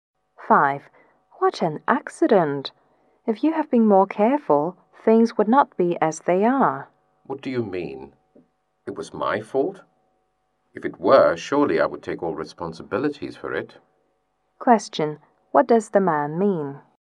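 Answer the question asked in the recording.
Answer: The accident wasn't his fault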